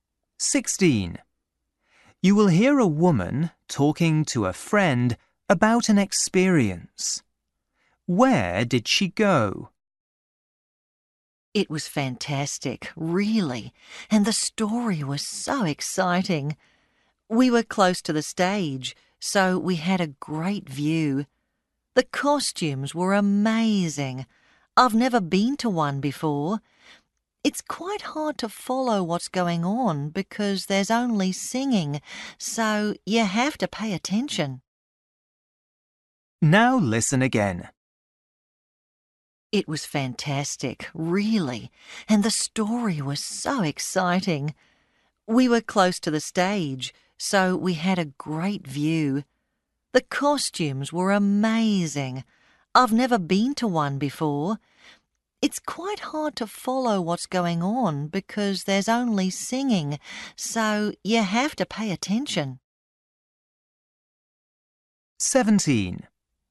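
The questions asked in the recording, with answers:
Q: Where did she go?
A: to an opera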